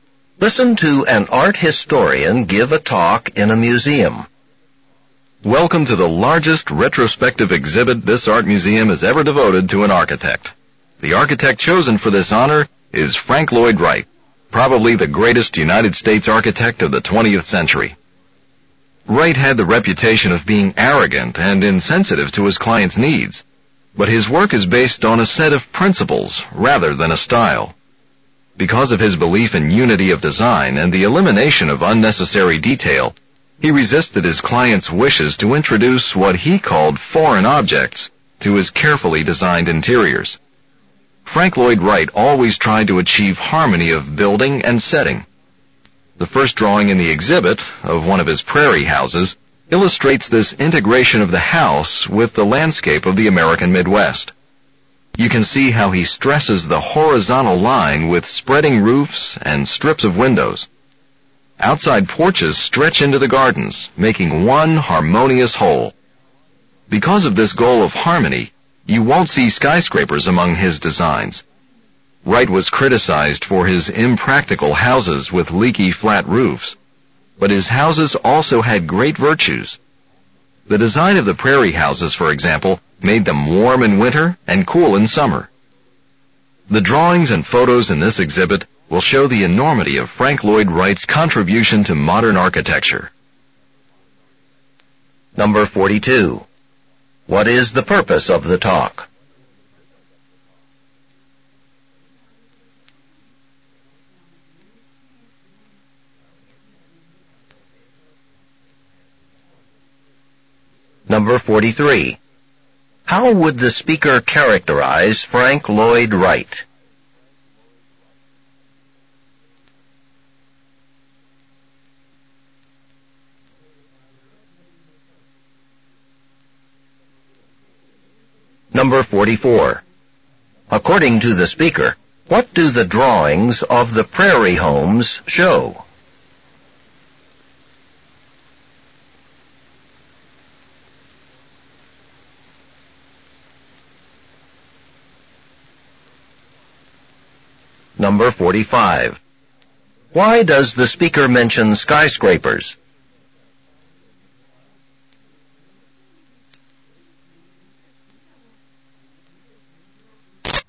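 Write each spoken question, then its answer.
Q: What is the purpose of the talk?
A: To introduce an exhibit of Frank Lloyd Wright's architecture

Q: According to the speaker, what do the drawings of the prairie homes show?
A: The integration of the house with the landscape

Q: Why does the speaker mention skyscrapers?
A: To show that Wright's goal of harmony with the setting kept him from designing them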